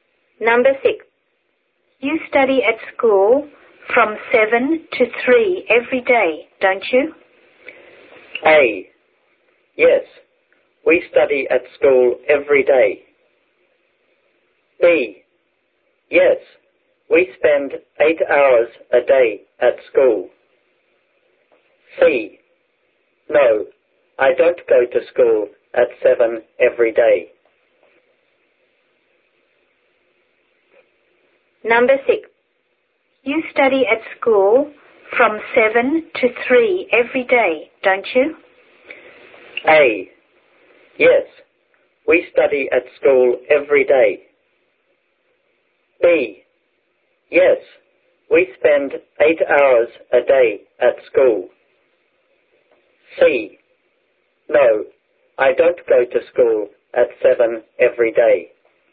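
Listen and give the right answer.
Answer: B: Yes, we spend 8 hours a day at school.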